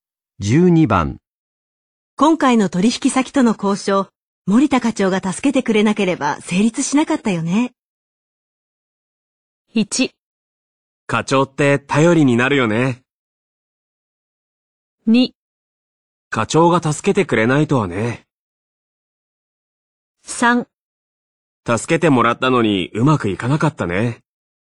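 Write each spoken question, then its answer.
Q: 今回の取引先との交渉、森田課長が助けてくれなければ成立しなかったよね。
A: 1: 課長って頼りになるよね。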